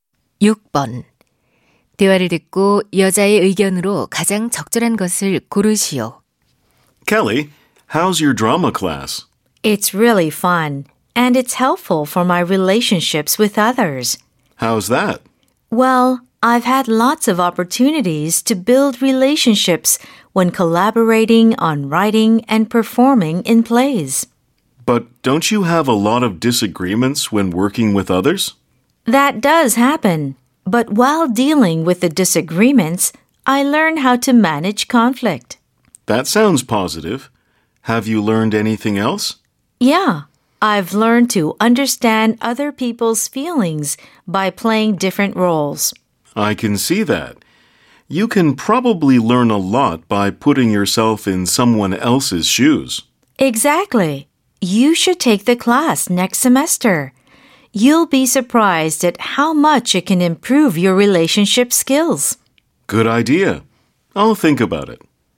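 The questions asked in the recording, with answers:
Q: 대화를 듣고 여자의 의견으로 가장 적절한 것을 고르시오.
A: 연극 수업은 대인 관계 능력 향상에 도움이 된다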